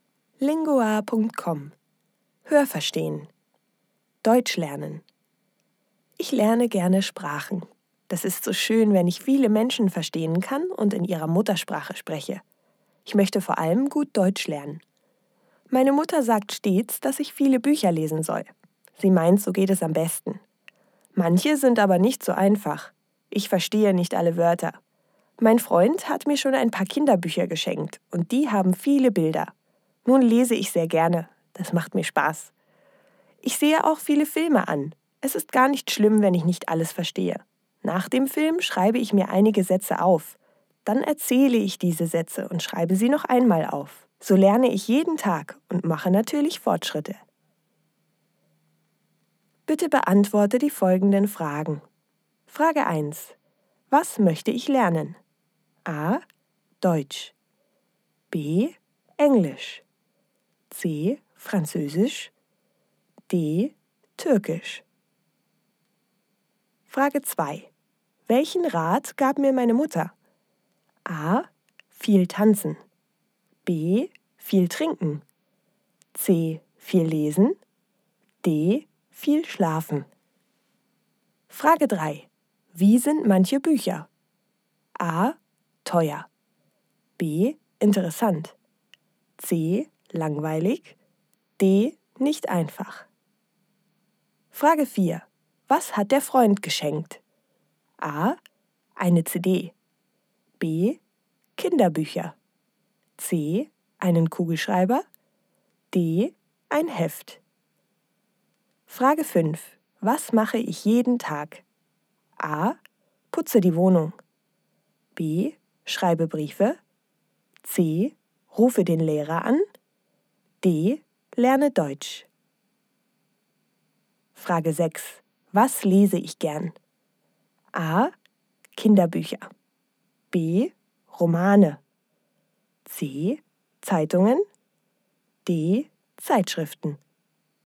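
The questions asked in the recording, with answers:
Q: Was möchte ich lernen?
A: A: Deutsch

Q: Welchen Rat gab mir meine Mutter?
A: C: Viel lesen

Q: Wie sind manche Bücher?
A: D: Nicht einfach

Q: Was hat der Freund geschenkt?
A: B: Kinderbücher

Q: Was mache ich jeden Tag?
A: D: Lerne Deutsch

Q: Was lese ich gern?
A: A: Kinderbücher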